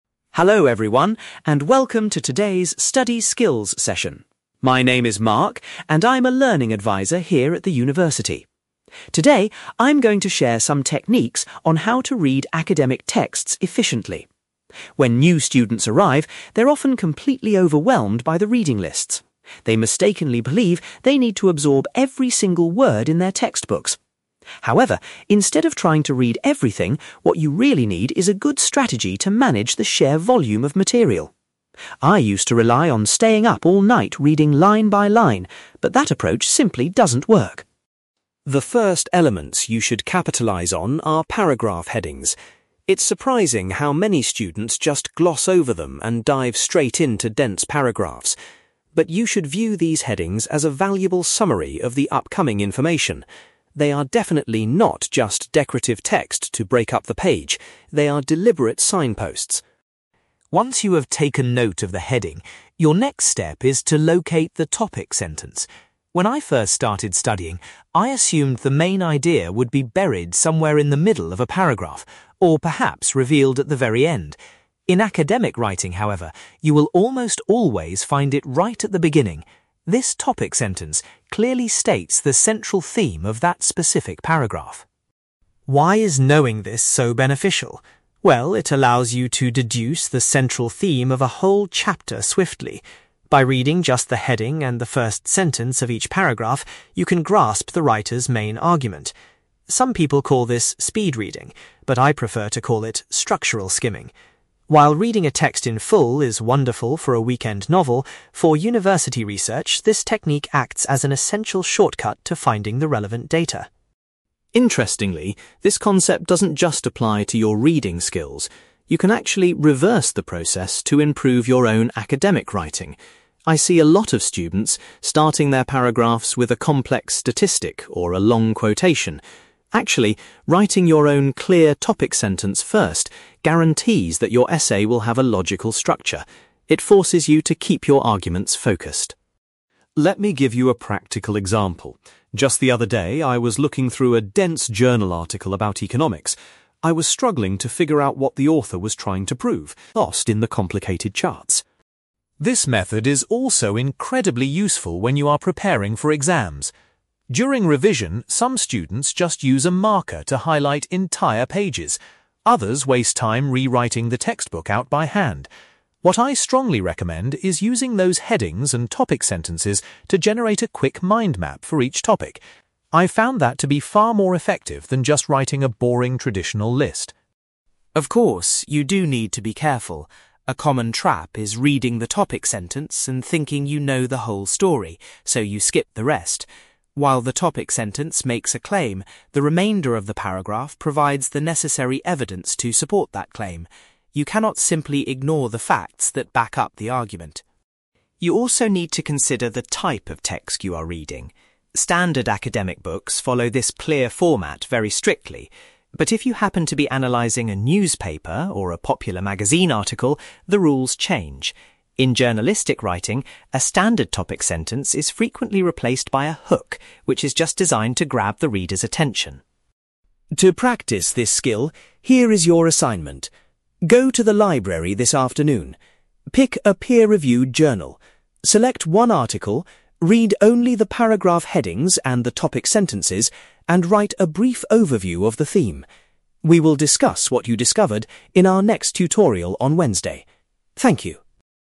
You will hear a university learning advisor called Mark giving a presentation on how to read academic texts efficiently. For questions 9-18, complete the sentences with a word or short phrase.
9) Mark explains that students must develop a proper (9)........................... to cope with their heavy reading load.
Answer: strategy

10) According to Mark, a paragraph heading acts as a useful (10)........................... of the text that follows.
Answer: summary

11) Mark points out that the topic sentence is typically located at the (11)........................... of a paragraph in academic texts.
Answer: beginning

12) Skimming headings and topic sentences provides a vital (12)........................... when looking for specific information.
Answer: shortcut

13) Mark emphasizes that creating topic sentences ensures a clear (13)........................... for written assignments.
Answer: structure

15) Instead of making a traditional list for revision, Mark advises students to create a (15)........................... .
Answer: mind map

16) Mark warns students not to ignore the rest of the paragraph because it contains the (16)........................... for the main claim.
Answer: evidence

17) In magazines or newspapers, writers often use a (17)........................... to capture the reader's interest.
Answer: hook

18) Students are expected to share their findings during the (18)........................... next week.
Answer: tutorial

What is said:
Mark: Hello everyone, and welcome to today's study skills session. My name is Mark, and I'm a learning advisor here at the university. Today, I'm going to share some techniques on how to read academic texts efficiently. When new students arrive, they're often completely overwhelmed by the reading lists. They mistakenly believe they need to absorb every single word in their textbooks. However, instead of trying to read everything, what you really need is a good strategy to manage the sheer volume of material. I used to rely on staying up all night reading line by line, but that approach simply doesn't work.
The first elements you should capitalize on are paragraph headings. It's surprising how many students just gloss over them and dive straight into dense paragraphs. But you should view these headings as a valuable summary of the upcoming information. They are definitely not just decorative text to break up the page; they are deliberate signposts.
Once you have taken note of the heading, your next step is to locate the topic sentence. When I first started studying, I assumed the main idea would be buried somewhere in the middle of a paragraph, or perhaps revealed at the very end. In academic writing, however, you will almost always find it right at the beginning. This topic sentence clearly states the central theme of that specific paragraph.
Why is knowing this so beneficial? Well, it allows you to deduce the central theme of a whole chapter swiftly. By reading just the heading and the first sentence of each paragraph, you can grasp the writer's main argument. Some people call this speed-reading, but I prefer to call it 'structural skimming'. While reading a text in full is wonderful for a weekend novel, for university research, this technique acts as an essential shortcut to finding the relevant data.
Interestingly, this concept doesn't just apply to your reading skills. You can actually reverse the process to improve your own academic writing. I see a lot of students starting their paragraphs with a complex statistic or a long quotation. Actually, writing your own clear topic sentence first guarantees that your essay will have a logical structure. It forces you to keep your arguments focused.
Let me give you a practical example. Just the other day, I was looking through a dense journal article about economics. I was struggling to figure out what the author was trying to prove. By looking at the headings and reading the topic sentences, I quickly deduced that the entire piece was discussing inflation. Without using that technique, I would have been completely lost in the complicated charts.
This method is also incredibly useful when you are preparing for exams. During revision, some students just use a marker to highlight entire pages. Others waste time rewriting the textbook out by hand. What I strongly recommend is using those headings and topic sentences to generate a quick mind map for each topic. I've found that to be far more effective than just writing a boring, traditional list.
Of course, you do need to be careful. A common trap is reading the topic sentence and thinking you know the whole story, so you skip the rest. While the topic sentence makes a claim, the remainder of the paragraph provides the necessary evidence to support that claim. You cannot simply ignore the facts that back up the argument.
You also need to consider the type of text you are reading. Standard academic books follow this clear format very strictly. But if you happen to be analyzing a newspaper or a popular magazine article, the rules change. In journalistic writing, a standard topic sentence is frequently replaced by a hook which is just designed to grab the reader's attention.
To practice this skill, here is your assignment. Go to the library this afternoon. Pick a peer-reviewed journal. Select one article, read only the paragraph headings and the topic sentences, and write a brief overview of the theme. We will discuss what you discovered in our next tutorial on Wednesday. Thank you.

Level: B2